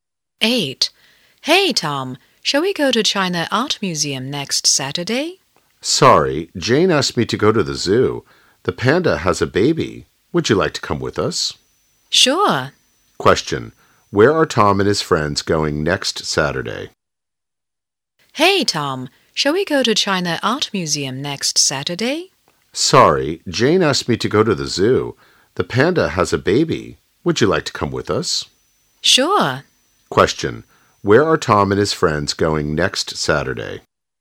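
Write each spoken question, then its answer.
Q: Question, where are Tom and his friends going next Saturday?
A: To the zoo.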